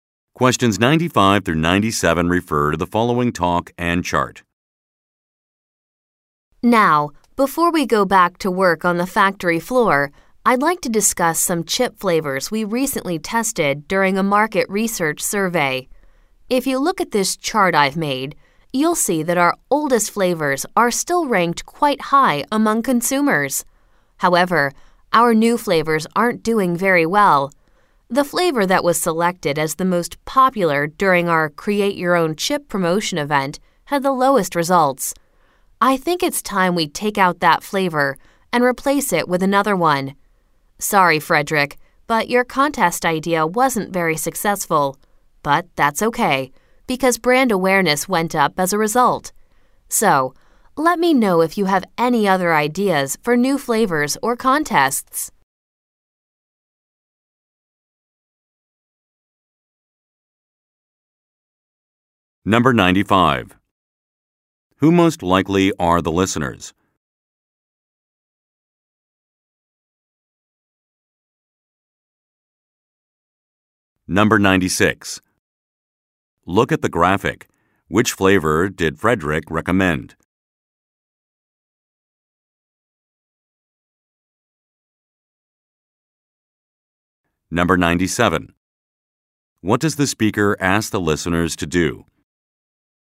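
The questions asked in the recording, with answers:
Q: Who most likely are the listeners?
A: Factory workers

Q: What does the speaker ask the listeners to do?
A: Share other ideas for new flavors or contests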